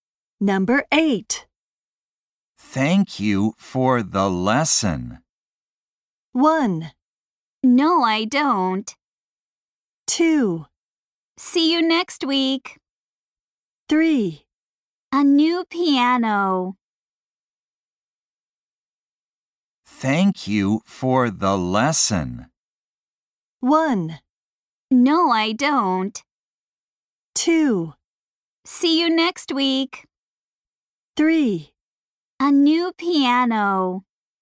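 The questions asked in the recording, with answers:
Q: Thank you for the lesson.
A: 2: See you next week.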